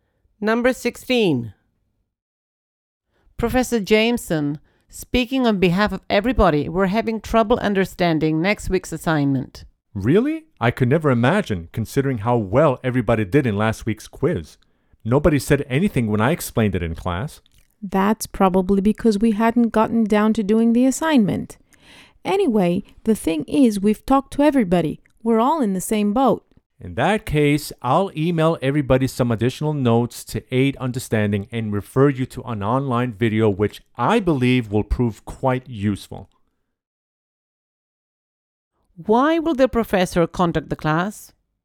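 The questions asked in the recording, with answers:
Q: Why will the professor contact the class?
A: To send additional notes to help them understand the assignment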